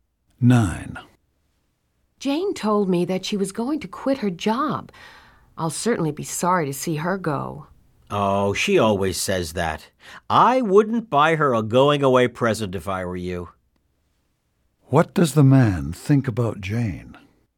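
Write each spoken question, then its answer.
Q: What does the man think about Jane?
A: She won't really quit her job.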